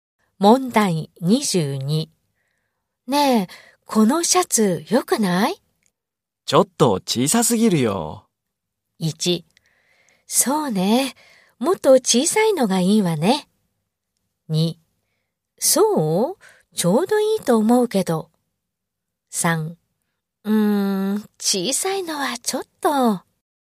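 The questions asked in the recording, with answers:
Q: ねえ、このシャツよくない?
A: 2: そう?ちょうどいいと思うけど。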